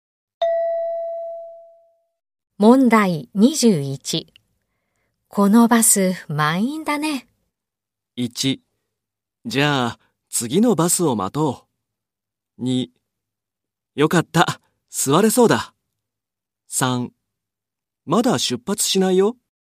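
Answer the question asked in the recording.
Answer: 1: じゃあ次のバスを待とう。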